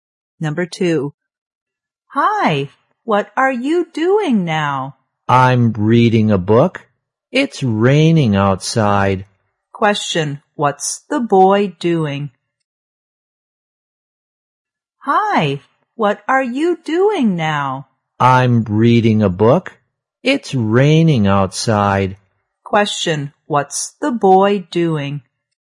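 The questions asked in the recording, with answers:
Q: Question, what's the boy doing?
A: Reading a book.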